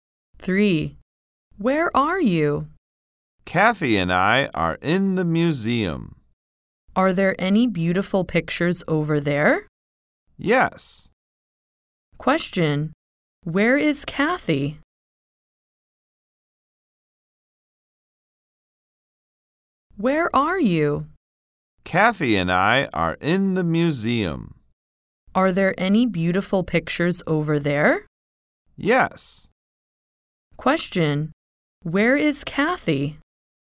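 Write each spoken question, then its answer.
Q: Question. Where is Kathy?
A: In the museum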